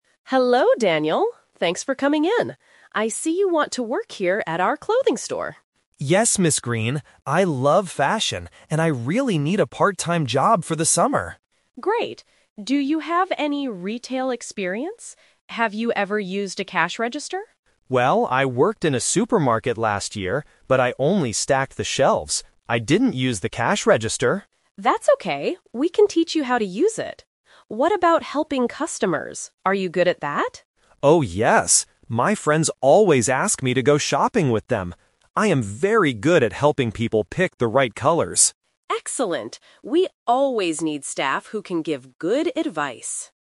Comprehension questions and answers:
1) What kind of job is Daniel looking for?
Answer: A part-time job.

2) What did Daniel do at his last job in the supermarket?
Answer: He stacked the shelves.

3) What is Daniel very good at doing?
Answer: Helping people choose colors.

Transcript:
Green: Hello, Daniel. Thanks for coming in. I see you want to work here at our clothing store.
Green. I love fashion, and I really need a part-time job for the summer.
Green: Great. Do you have any retail experience? Have you ever used a cash register?
Daniel: Well, I worked in a supermarket last year, but I only stacked the shelves. I didn't use the cash register.
Green: That's okay, we can teach you how to use it. What about helping customers? Are you good at that?
Daniel: Oh, yes! My friends always ask me to go shopping with them. I am very good at helping people pick the right colors.